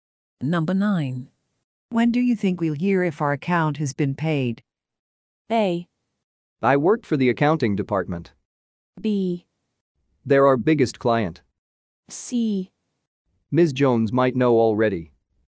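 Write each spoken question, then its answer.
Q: When do you think we'll hear if our account has been paid?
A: C: Ms. Jones might know already.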